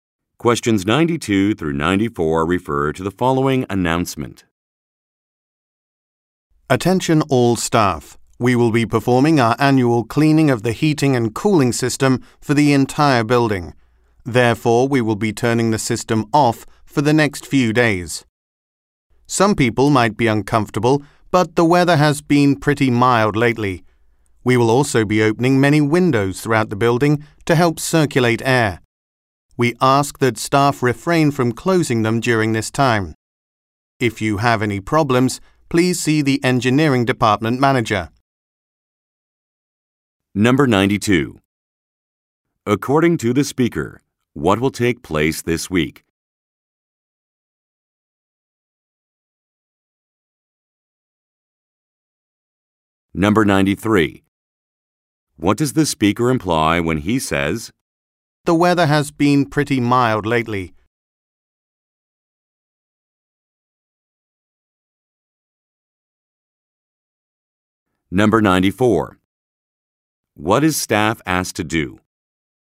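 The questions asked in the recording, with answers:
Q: According to the speaker, what will take place this week?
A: The annual cleaning of the building's heating and cooling system

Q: What does the speaker imply when he says, "The weather has been pretty mild lately"?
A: Staff shouldn't be too uncomfortable while the system is off

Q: What is staff asked to do?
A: Not close the windows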